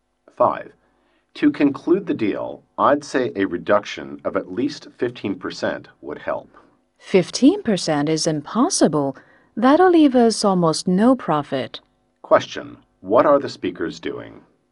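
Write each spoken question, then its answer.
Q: What are the speakers doing?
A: Negotiating (bargaining over) the price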